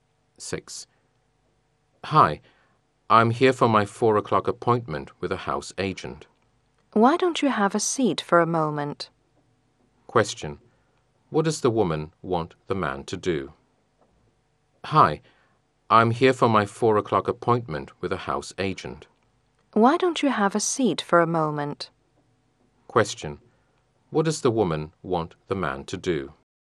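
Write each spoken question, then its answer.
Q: What does the woman want the man to do?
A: Have a seat and wait for a moment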